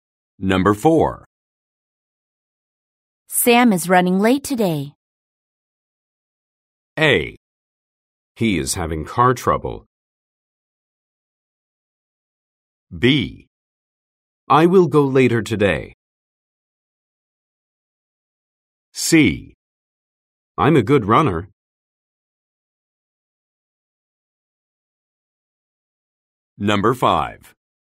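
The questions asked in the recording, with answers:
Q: Sam is running late today.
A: A: He is having car trouble.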